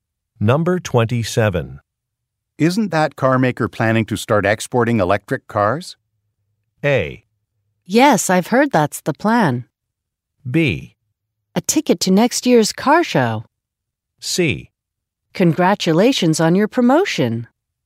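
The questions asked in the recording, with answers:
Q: Isn't that car maker planning to start exporting electric cars?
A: A: Yes, I've heard that's the plan.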